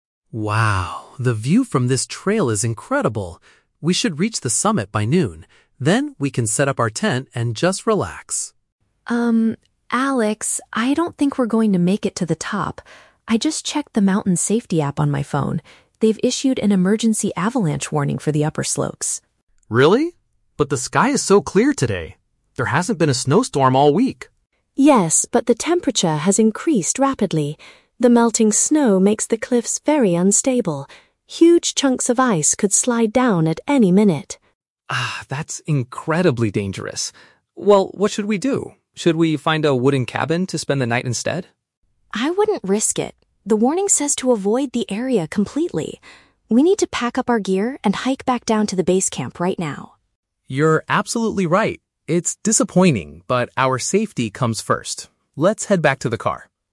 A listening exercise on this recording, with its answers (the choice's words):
Listen to a conversation between two hikers and choose the correct answer (A, B, or C) for each question.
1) Why does Sam want to stop the climbing trip?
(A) Because she forgot to bring the camping tent.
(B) Because her mobile app predicts a massive snow slide.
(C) Because a heavy winter storm is about to start.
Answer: Because her mobile app predicts a massive snow slide.

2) According to Sam, what is the main reason for the current danger?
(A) The weather has recently become much warmer.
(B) The strong winds are blowing heavy ice around.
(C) The heavy rain is destroying the mountain cliffs.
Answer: The weather has recently become much warmer.

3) What is the hikers' final decision?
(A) To continue walking until they find a wooden shelter.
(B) To ignore the warning and reach the summit by noon.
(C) To return to the bottom of the mountain immediately.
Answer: To return to the bottom of the mountain immediately.

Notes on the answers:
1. Sam says she checked the "mountain safety app on my phone" and there is an "avalanche warning". A "massive snow slide" is a direct paraphrase of an avalanche.
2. Sam explains that the "temperature has increased rapidly" which is melting the snow. "Become much warmer" is a paraphrase of the temperature increasing rapidly.
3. Sam suggests they need to "hike back down to the base camp right now", and Alex agrees ("Let's head back"). "Return to the bottom... immediately" is a paraphrase of hiking back down right now.

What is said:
Alex: Wow, the view from this trail is incredible. We should reach the summit by noon. Then we can set up our tent and just relax.
Sam: Um, Alex, I don't think we're going to make it to the top. I just checked the mountain safety app on my phone. They've issued an emergency avalanche warning for the upper slopes.
Alex: Really? But the sky is so clear today. There hasn't been a snowstorm all week.
Sam: Yes, but the temperature has increased rapidly. The melting snow makes the cliffs very unstable. Huge chunks of ice could slide down at any minute.
Alex: Ah, that's incredibly dangerous. Well, what should we do? Should we find a wooden cabin to spend the night instead?
Sam: I wouldn't risk it. The warning says to avoid the area completely. We need to pack up our gear and hike back down to the base camp right now.
Alex: You're absolutely right. It's disappointing, but our safety comes first. Let's head back to the car.